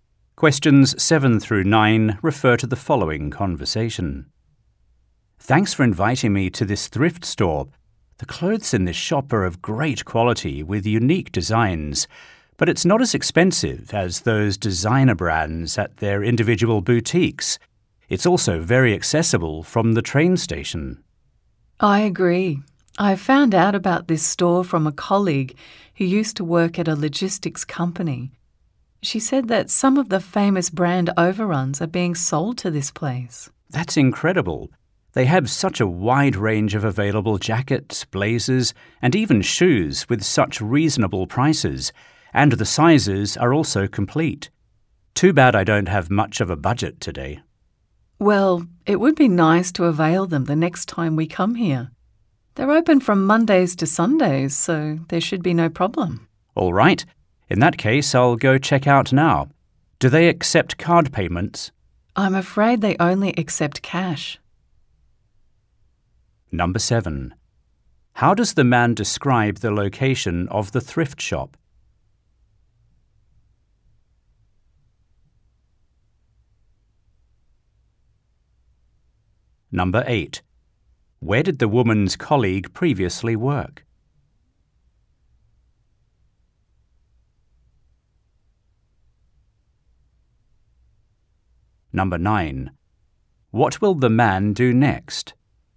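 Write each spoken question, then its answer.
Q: How does the man describe the location of the thrift shop?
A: It is very accessible from the train station

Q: Where did the woman's colleague previously work?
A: At a logistics company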